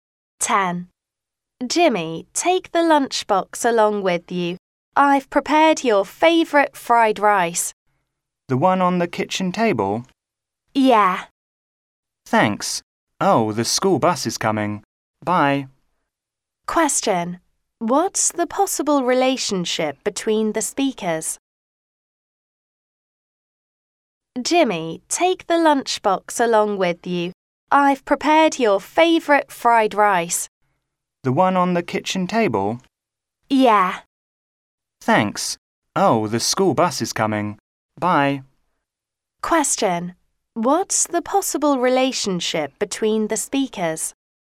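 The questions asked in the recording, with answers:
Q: What's the possible relationship between the speakers?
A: Mother and son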